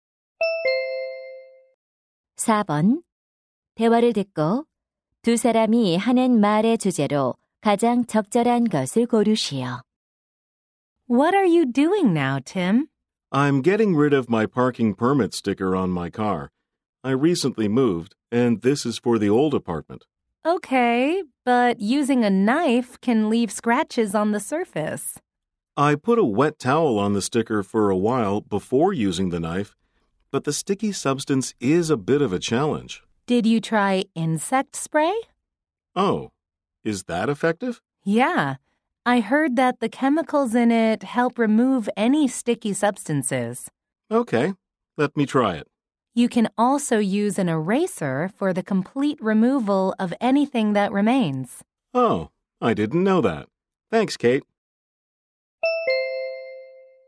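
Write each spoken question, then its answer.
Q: 대화를 듣고 두 사람이 하는 말의 주제로 가장 적절한 것을 고르시오.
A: 스티커를 깨끗하게 제거하는 방법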